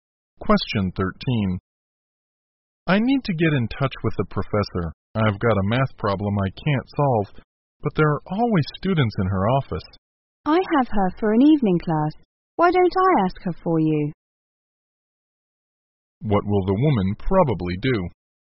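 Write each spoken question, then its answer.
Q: What will the woman probably do?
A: Ask the professor for the man in her evening class.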